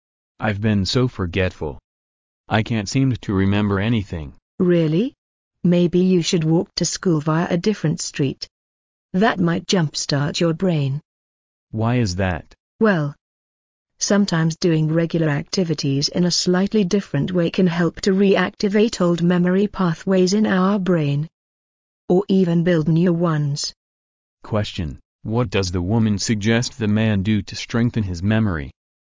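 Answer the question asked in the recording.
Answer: Walk to school via a different street

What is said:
[听力原文] M: Lately, I've been so forgetful. I can't seem to remember anything! W: Really? Maybe you should walk to school via a different street. That might jumpstart your brain. M: Why is that? W: Well, sometimes doing regular activities in a slightly different way can help to re-activate old memory pathways in our brain, or even build new ones. Question: What does the woman suggest the man do to strengthen his memory?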